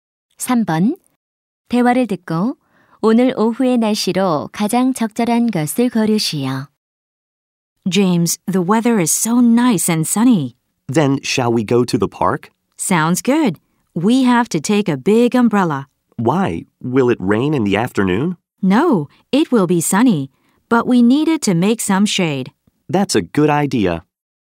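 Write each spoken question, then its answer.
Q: 대화를 듣고 오늘 오후의 날씨로 가장 적절한 것을 고르시오.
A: 맑음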